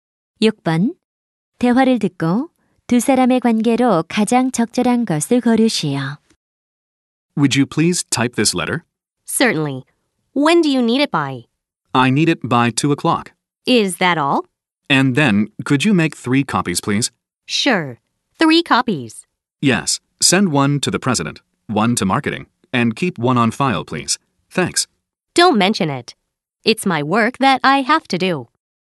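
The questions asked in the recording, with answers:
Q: 대화를 듣고 두 사람의 관계로 가장 적절한 것을 고르시오.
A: 상사와 비서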